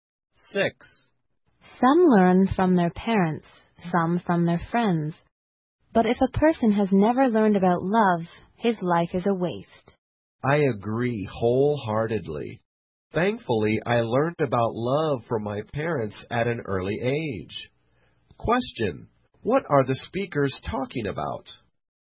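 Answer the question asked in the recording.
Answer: Learning about love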